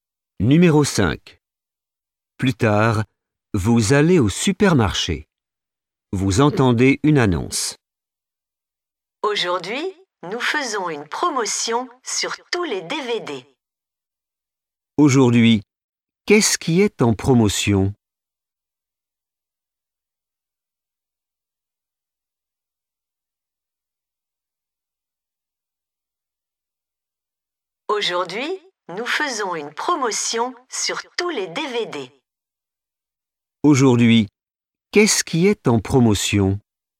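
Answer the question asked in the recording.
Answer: les DVD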